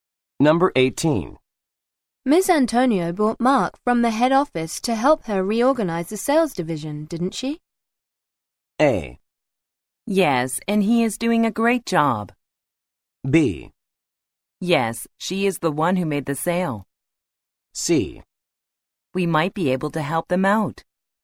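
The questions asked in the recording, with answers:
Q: Miss Antonio brought Mark from the head office to help her reorganize the sales division, didn't she?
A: A: Yes, and he is doing a great job.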